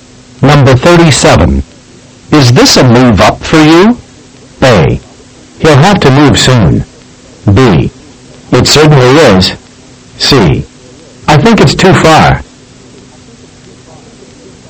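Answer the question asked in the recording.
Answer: B: It certainly is.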